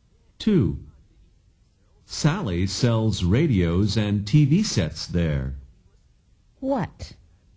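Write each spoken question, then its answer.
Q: What?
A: Radios and TV sets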